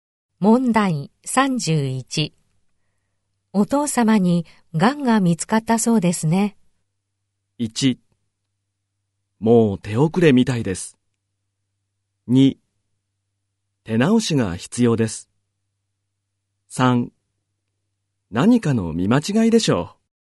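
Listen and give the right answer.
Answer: 1: もう手遅れみたいです。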